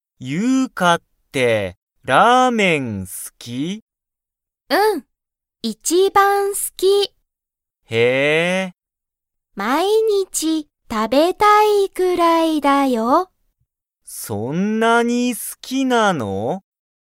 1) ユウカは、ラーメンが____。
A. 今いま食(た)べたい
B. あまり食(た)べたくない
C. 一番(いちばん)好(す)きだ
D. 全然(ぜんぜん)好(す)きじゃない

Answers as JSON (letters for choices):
{"1": "C"}

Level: Level 1